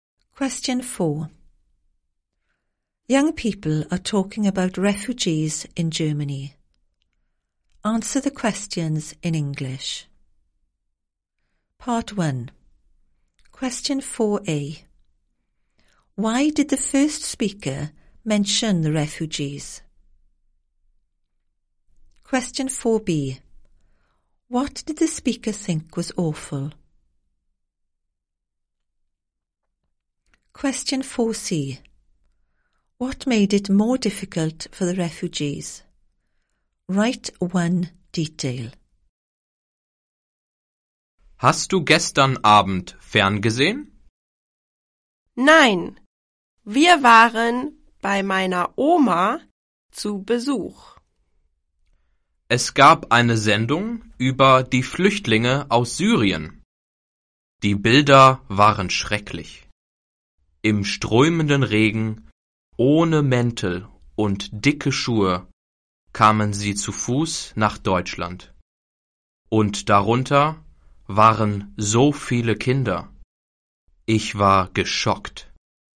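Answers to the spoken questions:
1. There was a TV programme about refugees from Syria
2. The pictures
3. Pouring rain, no coats or thick shoes, on foot, many children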